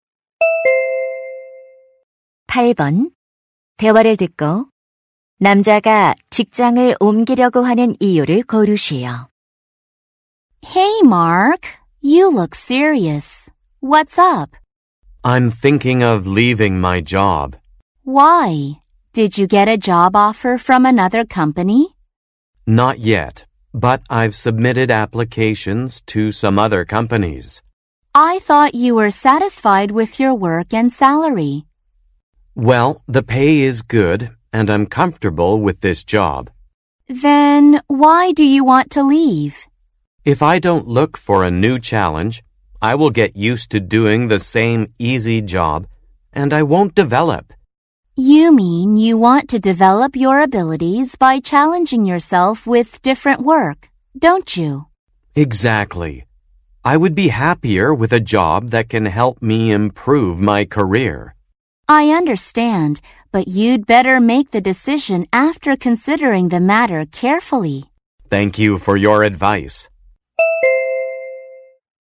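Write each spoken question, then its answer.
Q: 대화를 듣고 남자가 직장을 옮기려고 하는 이유를 고르시오.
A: 새로운 일에 도전하며 능력을 키우고 싶어서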